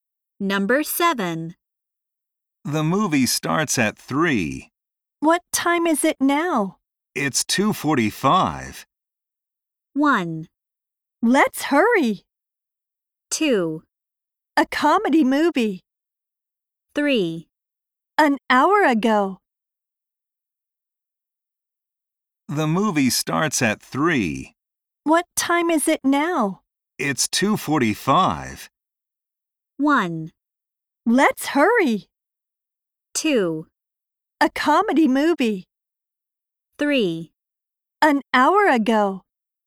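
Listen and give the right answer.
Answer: 1: Let's hurry.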